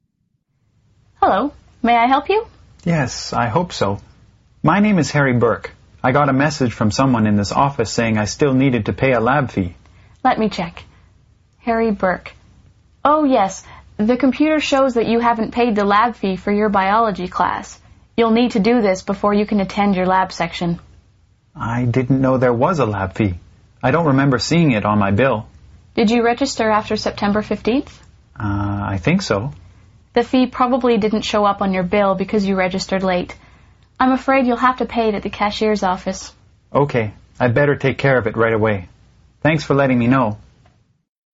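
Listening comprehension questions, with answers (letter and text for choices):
Listen to the recording and answer the multiple-choice question by selecting the correct response. Only one response is correct.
What will the man probably do next?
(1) Show the woman his tuition bill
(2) Pay for his biology textbooks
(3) Go to the cashier's office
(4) Change his biology lab section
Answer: (3) Go to the cashier's office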